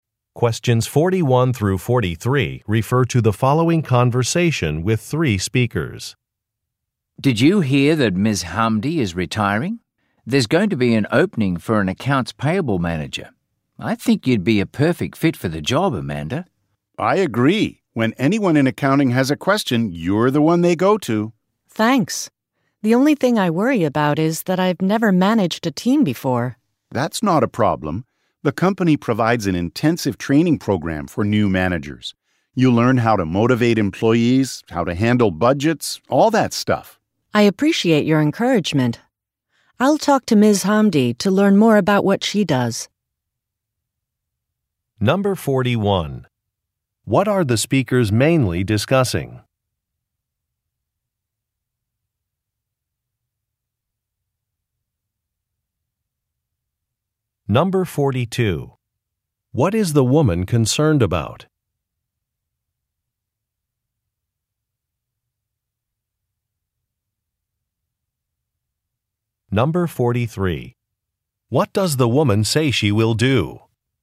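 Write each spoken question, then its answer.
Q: What are the speakers mainly discussing?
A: A job opening for an accounts payable manager

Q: What is the woman concerned about?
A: She has never managed a team before

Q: What does the woman say she will do?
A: Talk to Ms. Hamdi to learn more about her job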